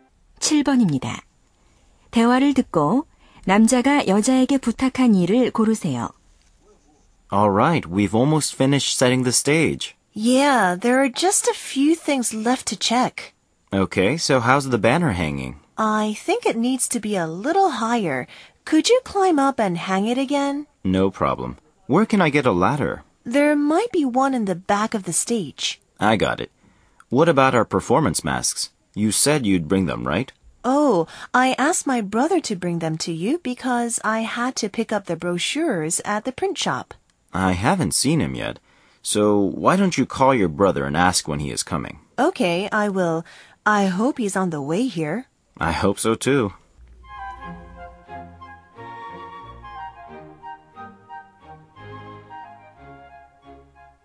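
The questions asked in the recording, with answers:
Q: 대화를 듣고 남자가 여자에게 부탁한 일을 고르세요.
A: 남동생에게 전화해서 언제 오는지 물어보기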